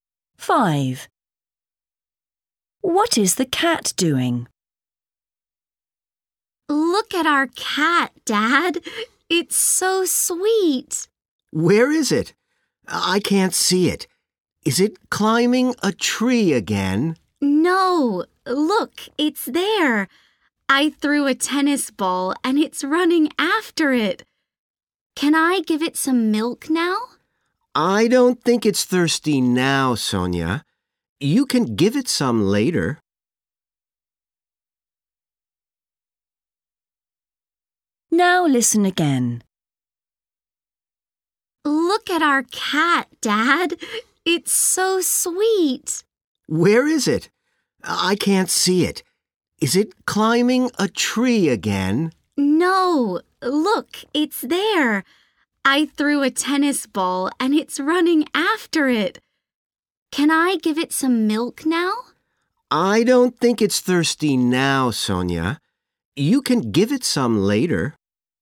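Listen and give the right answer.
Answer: running after a tennis ball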